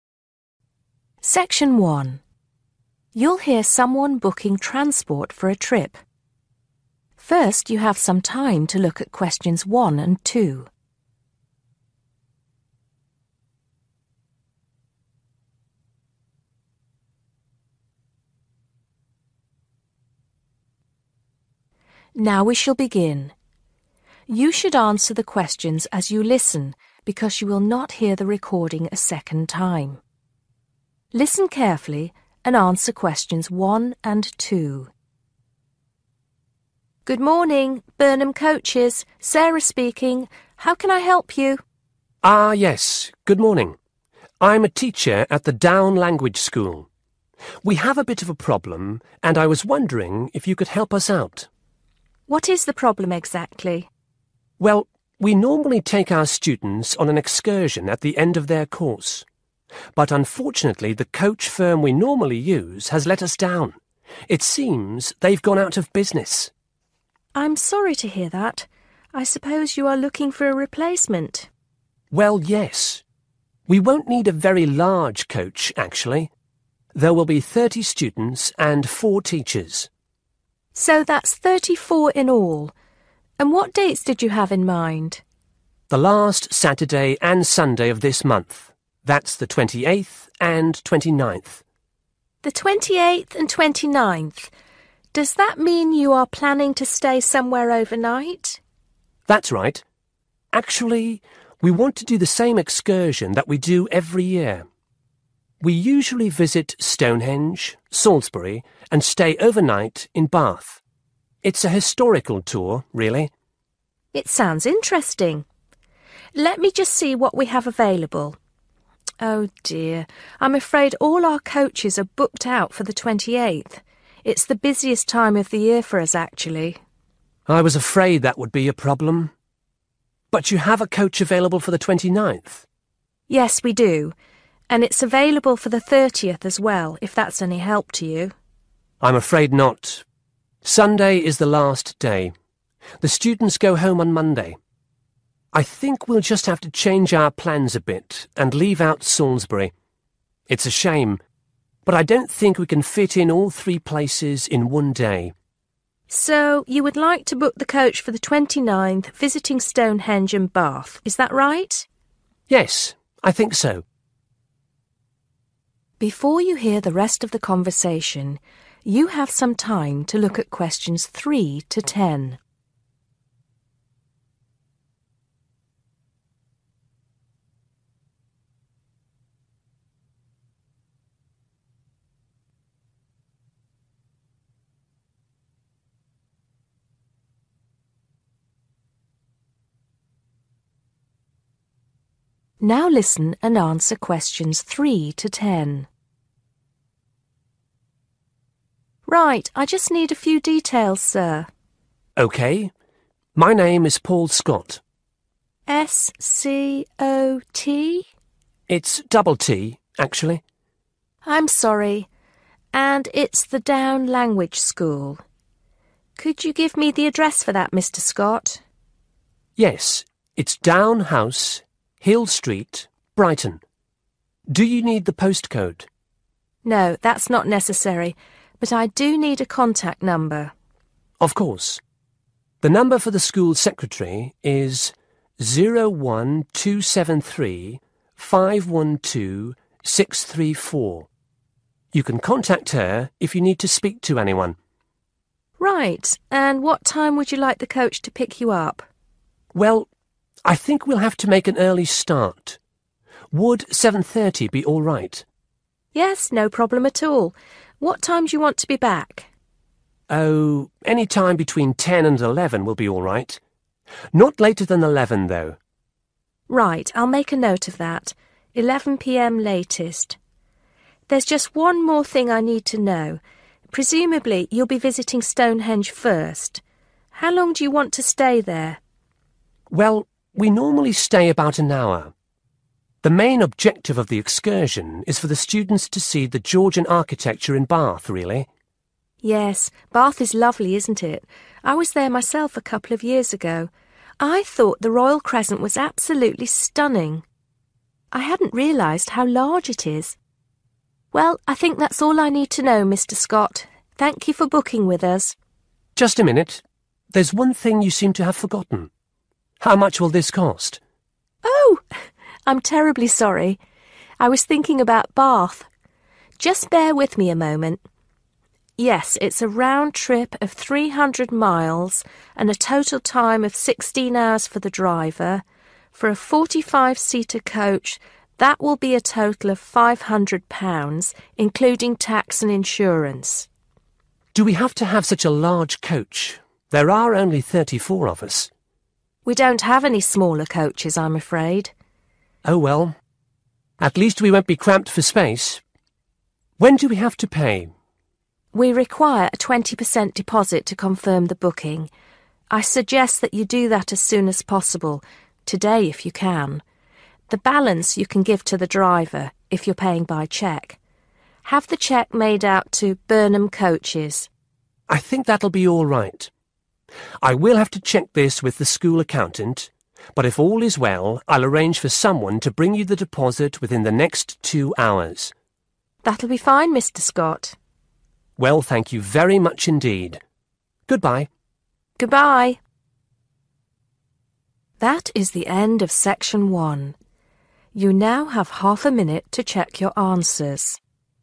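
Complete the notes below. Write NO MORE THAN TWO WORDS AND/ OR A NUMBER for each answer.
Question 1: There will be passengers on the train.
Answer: 34

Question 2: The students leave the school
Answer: on Monday

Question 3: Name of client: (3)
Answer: Paul Scott

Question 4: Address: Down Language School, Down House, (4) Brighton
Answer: Hill Street

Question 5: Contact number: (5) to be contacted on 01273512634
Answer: school secretary

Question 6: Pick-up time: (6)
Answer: 7:30

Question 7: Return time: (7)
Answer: 11 p.m. latest

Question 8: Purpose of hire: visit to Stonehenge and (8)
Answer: Bath

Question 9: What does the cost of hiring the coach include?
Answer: tax and insurance

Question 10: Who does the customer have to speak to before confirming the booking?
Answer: the school accountant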